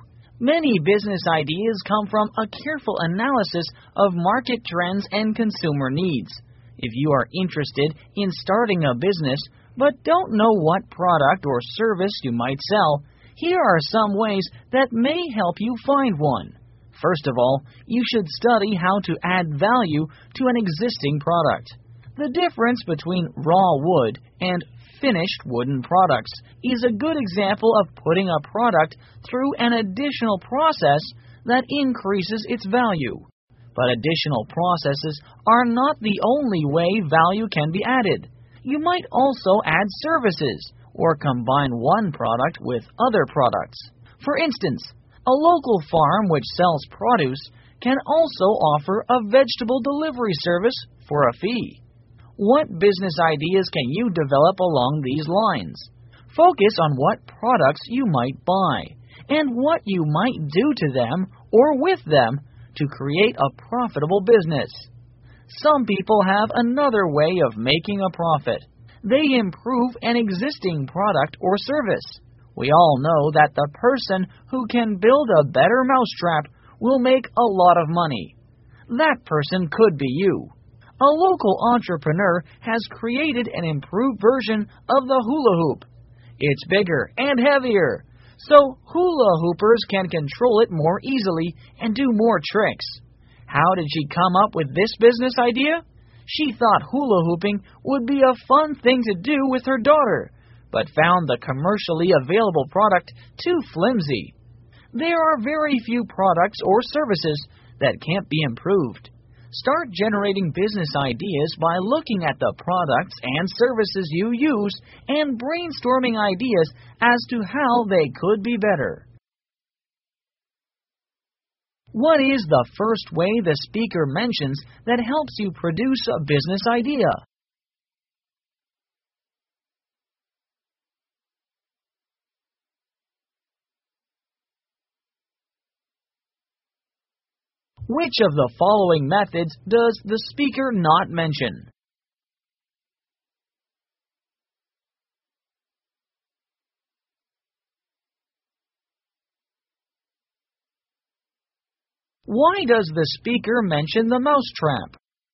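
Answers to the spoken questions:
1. Adding value to an existing product
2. To show that improving an existing product can make a lot of money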